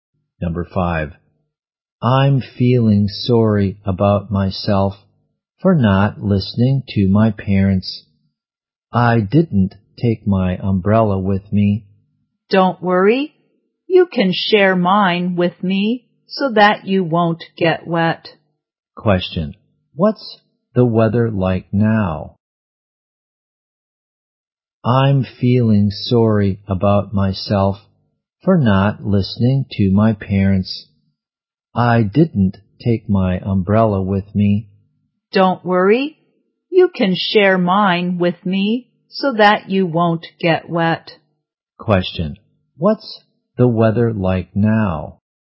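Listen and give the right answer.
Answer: Rainy.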